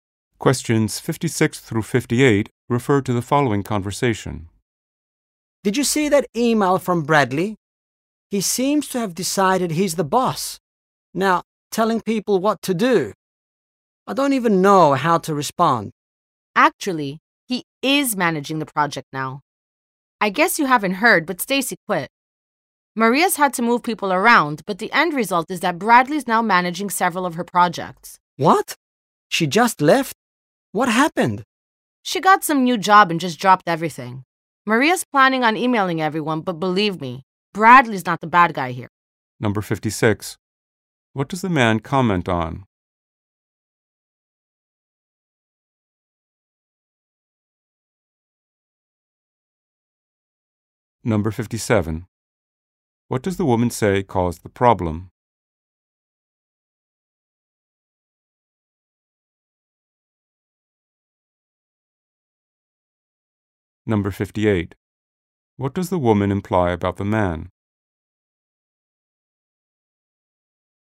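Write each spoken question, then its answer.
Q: What does the man comment on?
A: An email from Bradley telling people what to do

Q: What does the woman say caused the problem?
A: Stacy suddenly quit

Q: What does the woman imply about the man?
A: He hasn't heard the news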